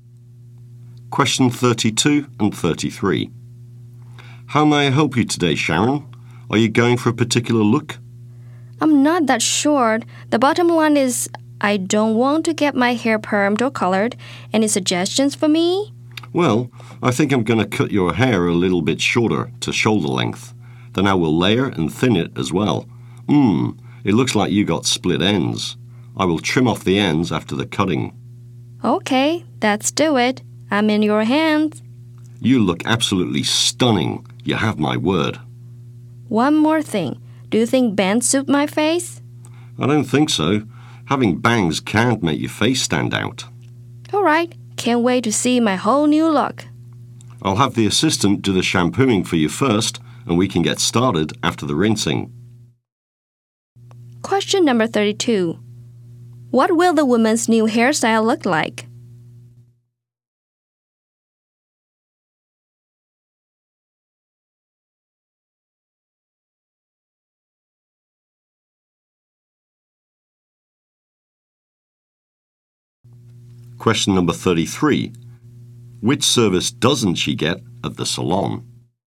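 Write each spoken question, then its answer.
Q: What will the woman's new hairstyle look like?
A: Shoulder-length, layered and thinned, without bangs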